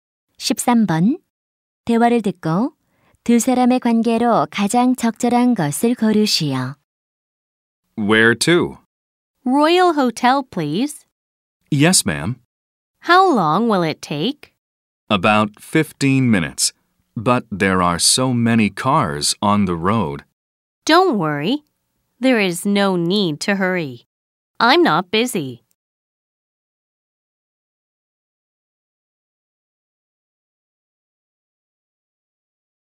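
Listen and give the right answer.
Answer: 택시 기사와 승객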